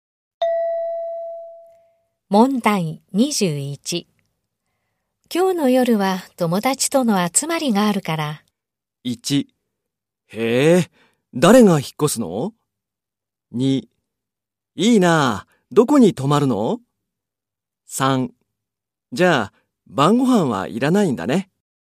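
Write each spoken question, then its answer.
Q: 今日の夜は友達との集まりがあるから。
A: 3: じゃあ、晩ご飯はいらないんだね。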